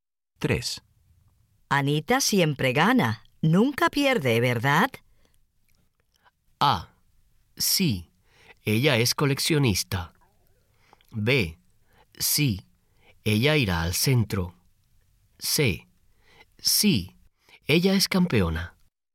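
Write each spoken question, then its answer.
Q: Anita siempre gana. Nunca pierde, ¿verdad?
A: C: Sí. Ella es campeona.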